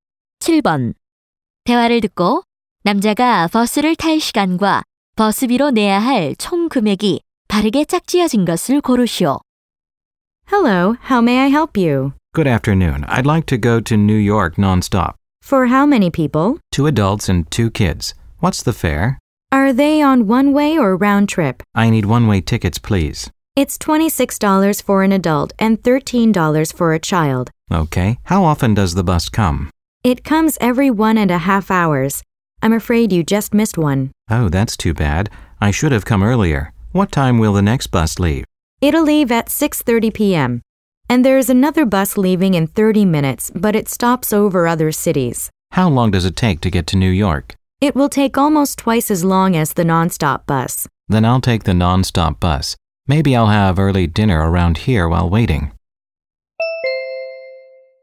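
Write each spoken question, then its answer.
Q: 대화를 듣고 남자가 버스를 탈 시간과 버스비로 내야 할 총 금액이 바르게 짝지어진 것을 고르시오.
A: 6:30 p.m., $78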